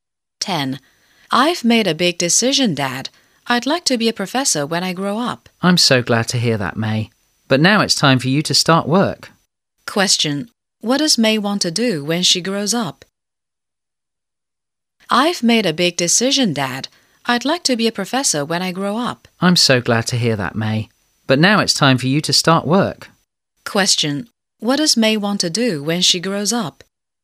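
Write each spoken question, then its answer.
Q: Question. What does May want to do when she grows up?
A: Be a professor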